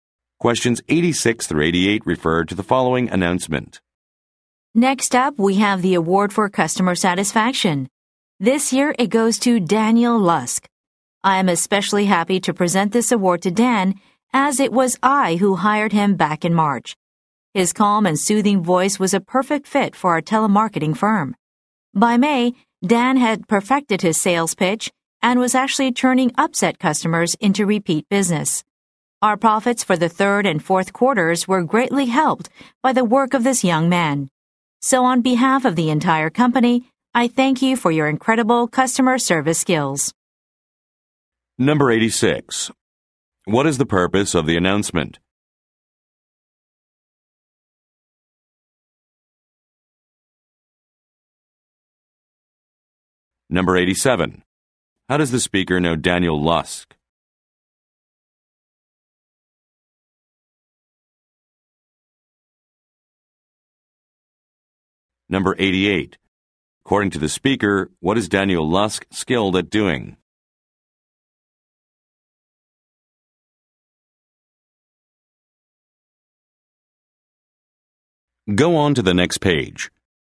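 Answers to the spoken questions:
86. To present a customer satisfaction award
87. The speaker hired him
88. Turning upset customers into repeat business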